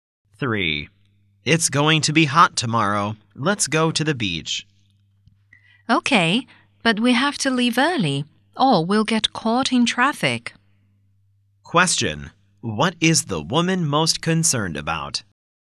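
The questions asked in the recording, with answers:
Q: What is the woman most concerned about?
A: Getting caught in traffic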